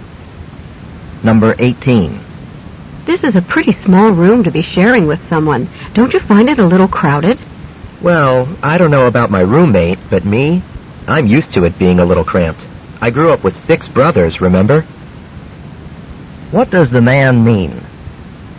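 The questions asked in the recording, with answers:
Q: What does the man mean?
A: He doesn't mind the small room; he's used to crowded spaces.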